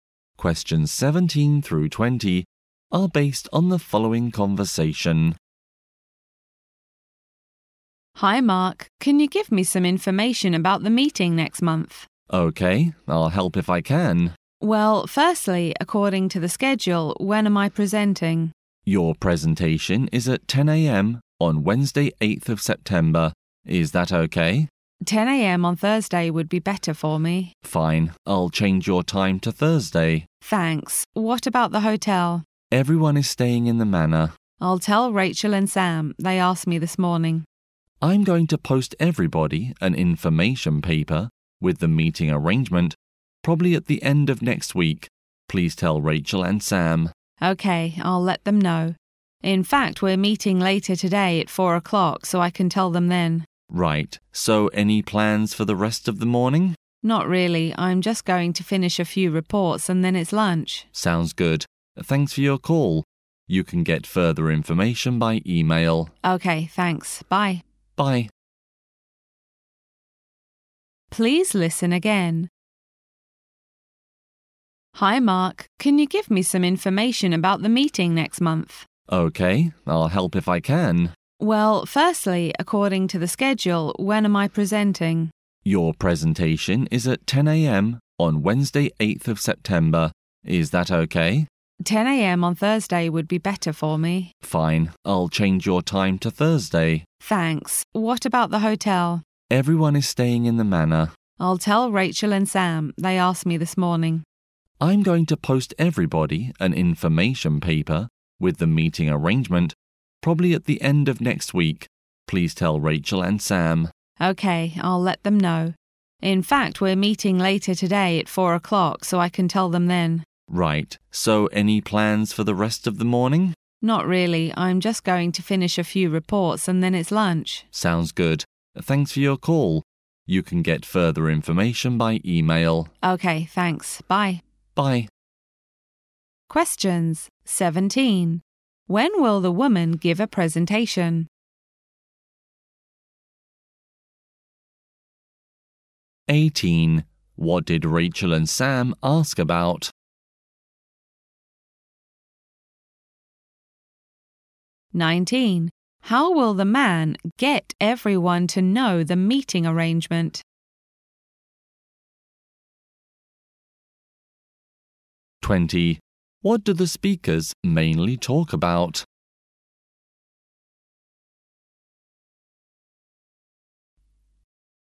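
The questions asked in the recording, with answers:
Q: When will the woman give a presentation?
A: At 10 a.m. on Thursday

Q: What did Rachel and Sam ask about?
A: The hotel

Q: How will the man get everyone to know the meeting arrangement?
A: By posting everyone an information paper

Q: What do the speakers mainly talk about?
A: The arrangements for next month's meeting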